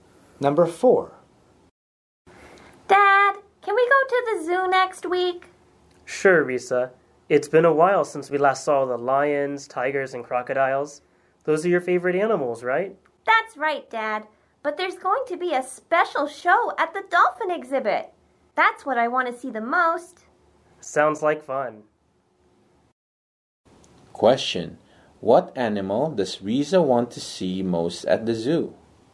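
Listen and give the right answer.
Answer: Dolphins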